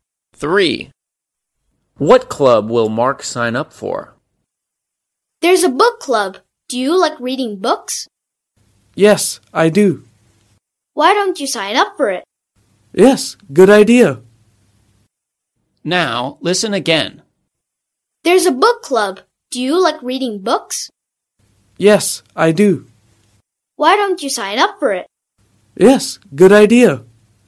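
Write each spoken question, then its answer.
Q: What club will Mark sign up for?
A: book club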